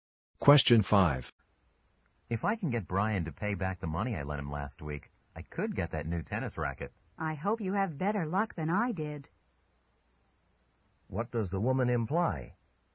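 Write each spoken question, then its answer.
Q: What does the woman imply?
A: Brian didn't pay her back money he borrowed.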